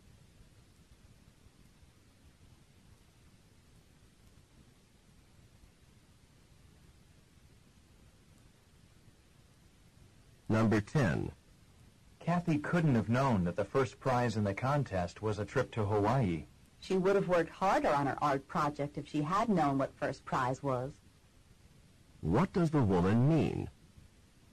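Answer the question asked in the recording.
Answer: Kathy did not know what first prize was, so she did not work hard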